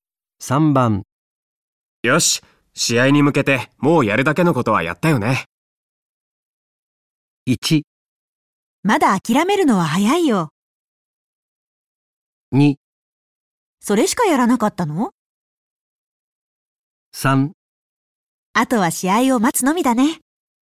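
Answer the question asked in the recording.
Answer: 3: あとは試合を待つのみだね。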